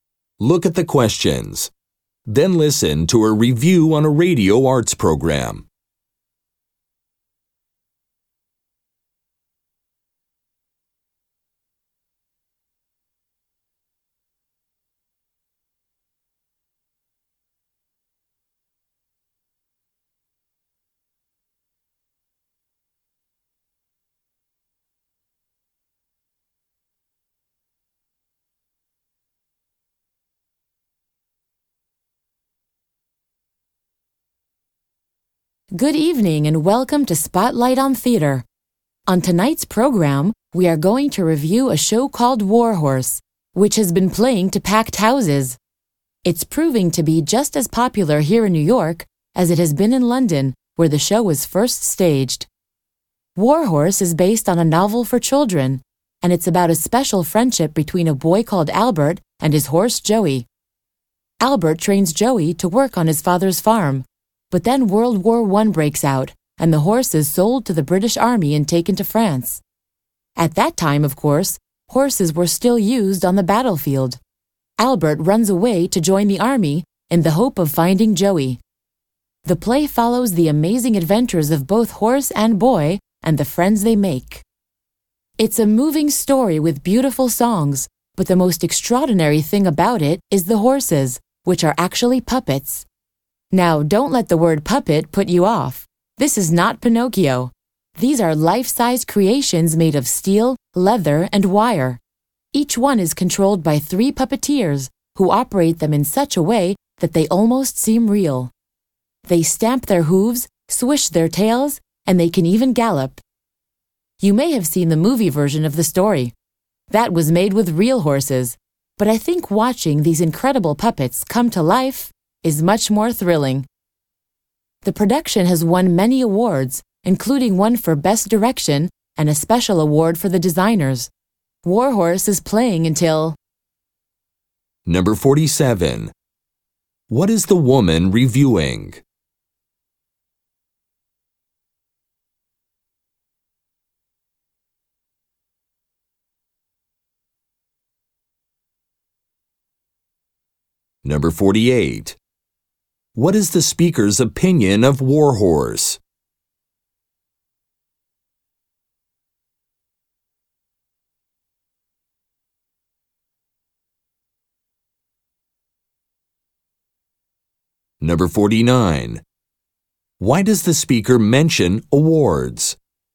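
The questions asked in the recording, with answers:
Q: What is the woman reviewing?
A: A play called War Horse

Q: What is the speaker's opinion of War Horse?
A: She thinks it is thrilling and very good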